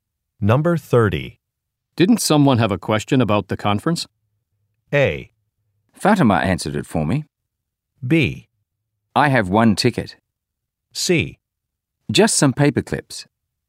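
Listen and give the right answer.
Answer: A: Fatima answered it for me.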